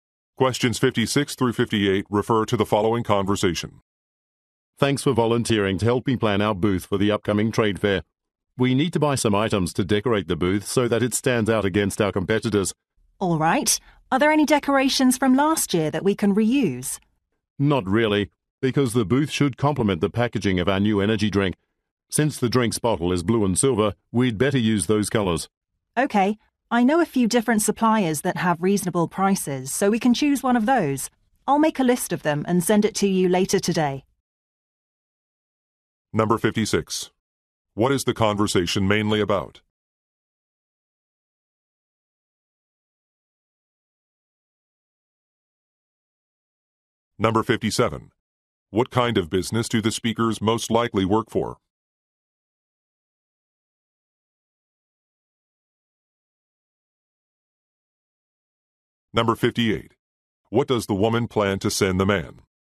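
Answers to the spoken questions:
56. Planning a trade fair booth
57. A beverage company
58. A list of suppliers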